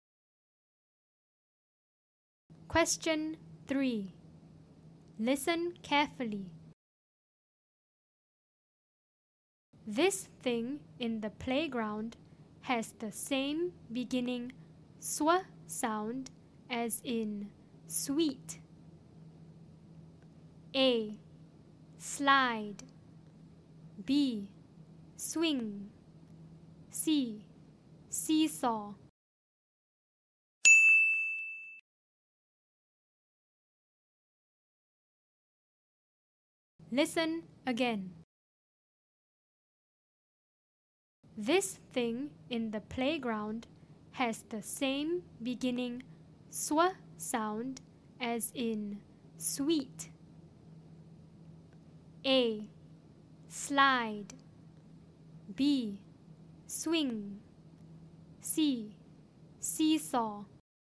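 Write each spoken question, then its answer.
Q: This thing in the playground has the same beginning sw sound as in sweet.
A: B: Swing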